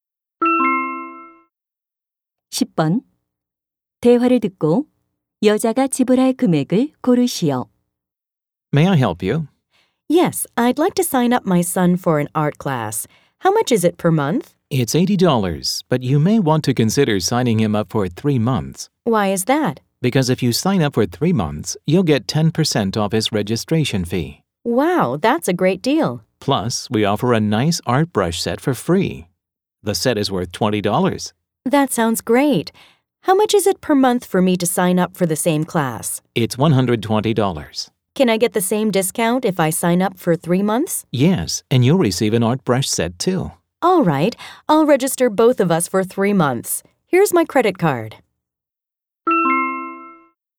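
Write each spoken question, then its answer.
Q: 대화를 듣고 여자가 지불할 금액을 고르시오.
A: $540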